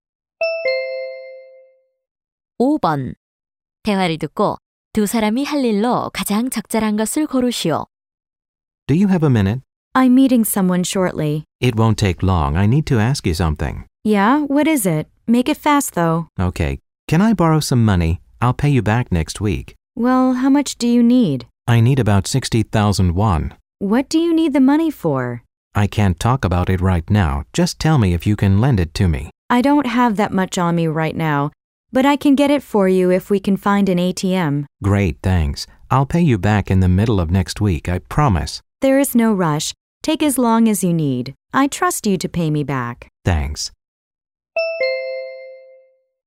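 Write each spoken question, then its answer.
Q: 대화를 듣고 두 사람이 할 일로 가장 적절한 것을 고르시오.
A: 현금인출기(ATM)를 찾아 돈을 인출한다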